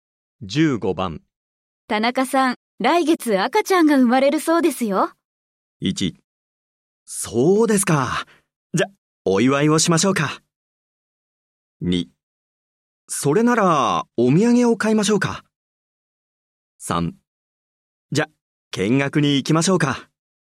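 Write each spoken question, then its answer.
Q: 田中さん、来月赤ちゃんが生まれるそうですよ。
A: 1: そうですか。じゃ、お祝いをしましょうか。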